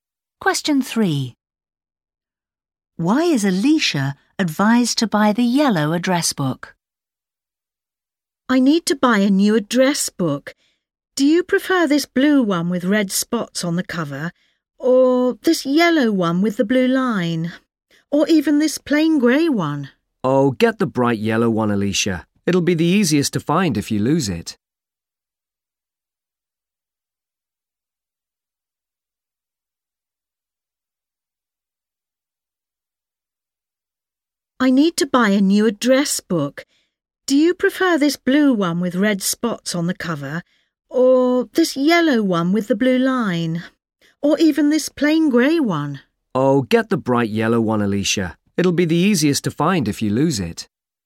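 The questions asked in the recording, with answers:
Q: Why is Alicia advised to buy the yellow address book?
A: It will be the easiest to find if she loses it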